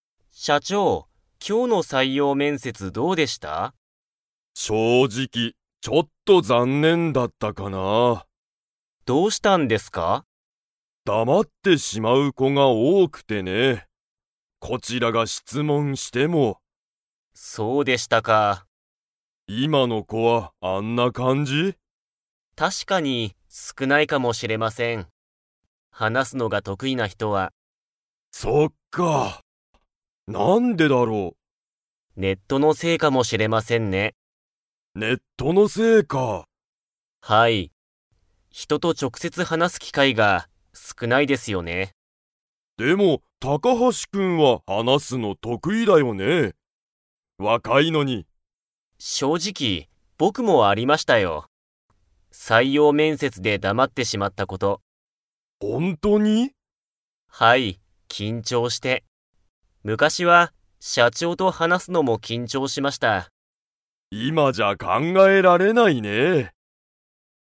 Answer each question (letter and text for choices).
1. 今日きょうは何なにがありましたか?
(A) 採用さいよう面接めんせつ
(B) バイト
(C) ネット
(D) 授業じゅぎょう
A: (A) 採用さいよう面接めんせつ

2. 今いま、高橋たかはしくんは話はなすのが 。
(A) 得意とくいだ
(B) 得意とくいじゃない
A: (A) 得意とくいだ

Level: Level 4